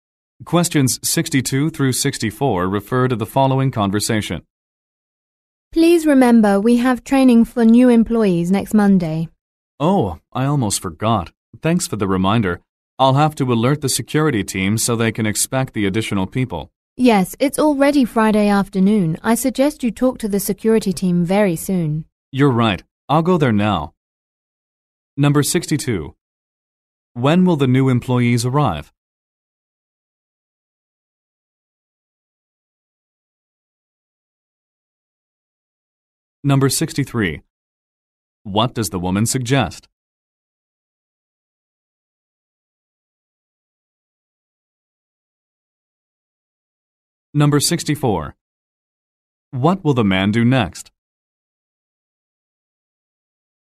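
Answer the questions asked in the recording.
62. Next Monday
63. Talking to the security team soon
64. Go to the security team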